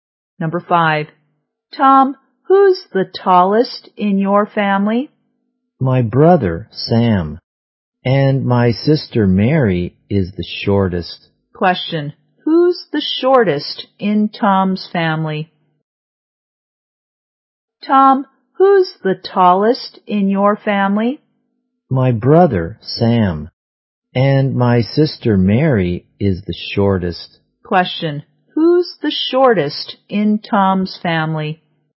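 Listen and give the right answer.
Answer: Mary, his sister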